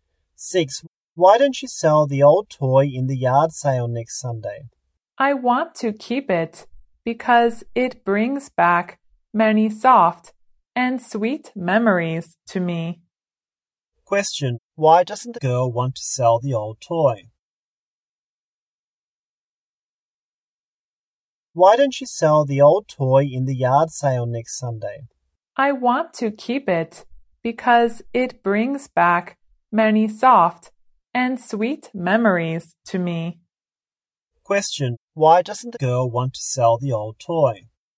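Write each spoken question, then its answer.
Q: Why doesn't the girl want to sell the old toy?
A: Because it brings back many soft and sweet memories to her.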